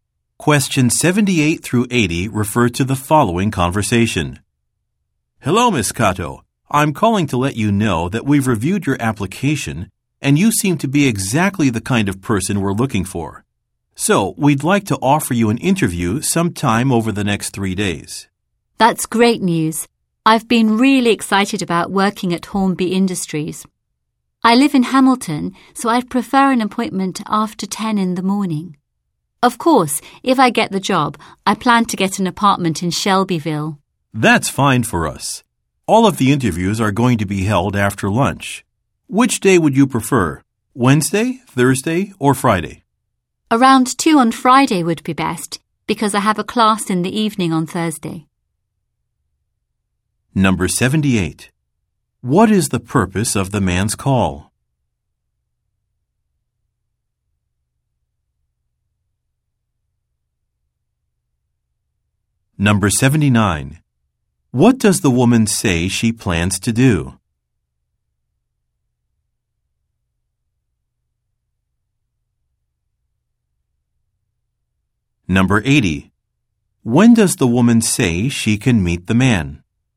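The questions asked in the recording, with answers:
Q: What is the purpose of the man's call?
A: To invite her to a job interview

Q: What does the woman say she plans to do?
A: Get an apartment in Shelbyville if she gets the job

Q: When does the woman say she can meet the man?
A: Around 2 on Friday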